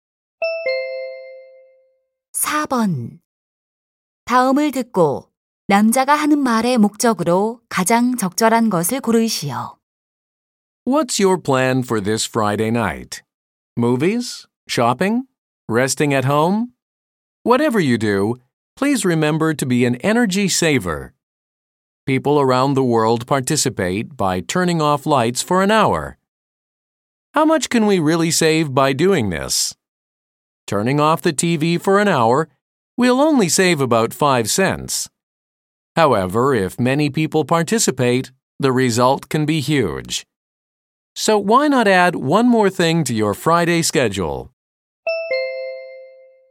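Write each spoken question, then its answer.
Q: 다음을 듣고 남자가 하는 말의 목적으로 가장 적절한 것을 고르시오.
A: 금요일 밤 한 시간 동안 불을 끄는 에너지 절약 행사 참여 권장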